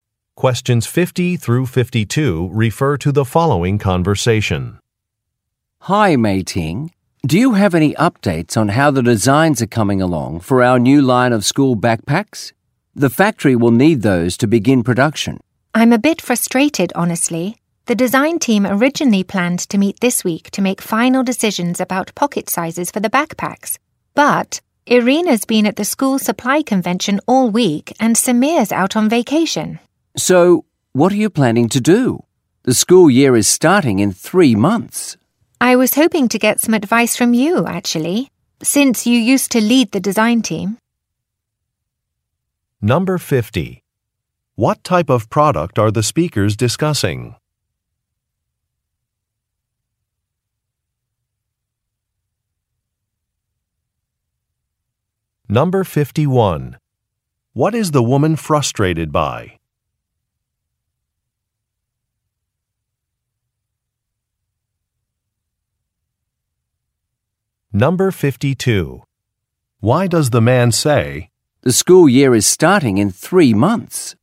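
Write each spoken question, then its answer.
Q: What type of product are the speakers discussing?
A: School backpacks

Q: What is the woman frustrated by?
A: Design team members are away, so the meeting can't happen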